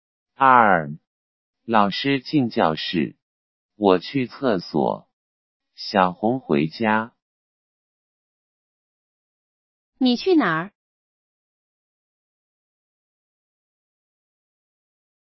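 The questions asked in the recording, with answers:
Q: 你去哪儿?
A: 去厕所。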